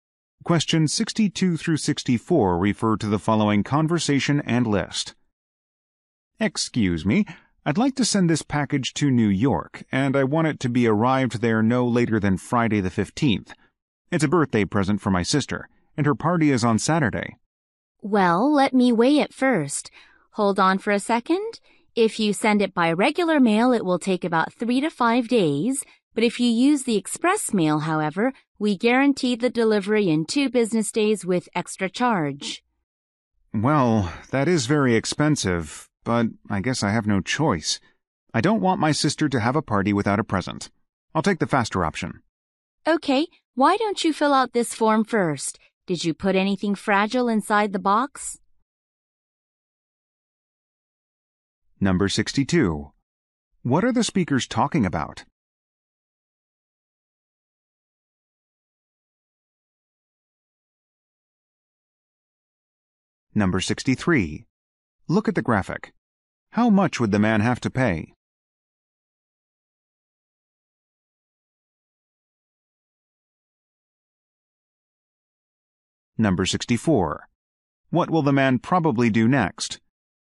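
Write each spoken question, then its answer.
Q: What are the speakers talking about?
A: Sending a package to New York by mail

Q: What will the man probably do next?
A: Fill out a form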